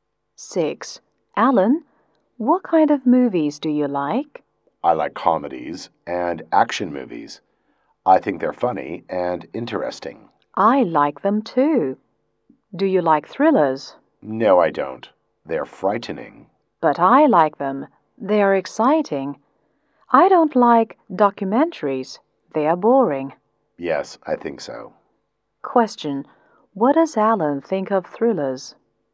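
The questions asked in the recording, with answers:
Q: What does Alan think of thrillers?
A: They are frightening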